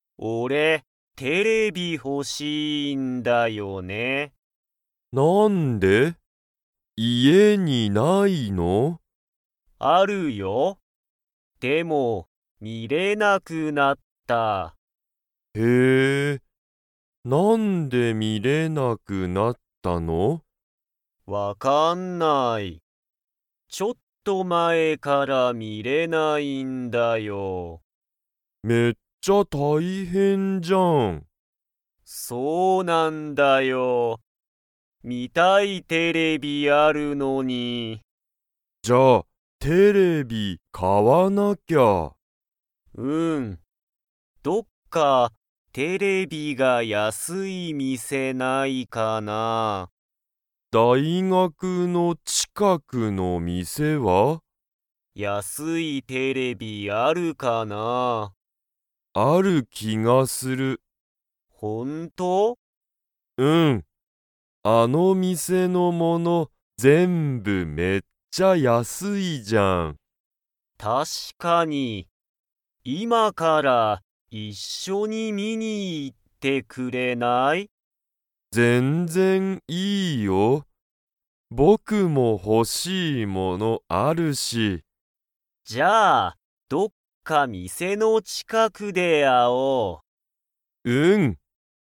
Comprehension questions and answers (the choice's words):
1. ゆうじは今いま、家(いえ)でテレビが見(み)れますか?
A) はい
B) いいえ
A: いいえ

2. 大学だいがくの近ちかくの店みせのものは、全部(ぜんぶ)____。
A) ちょっと前(まえ)だ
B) めっちゃ大変(たいへん)だ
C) ちょっと一緒いっしょだ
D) めっちゃ安(やす)い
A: めっちゃ安(やす)い

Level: Level 2